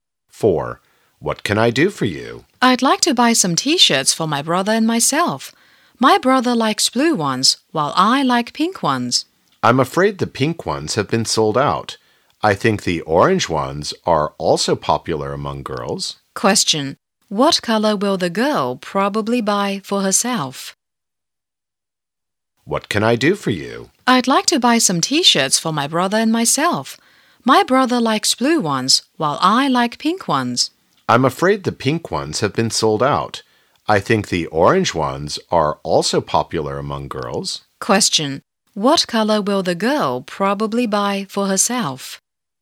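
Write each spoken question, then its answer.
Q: What color will the girl probably buy for herself?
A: Orange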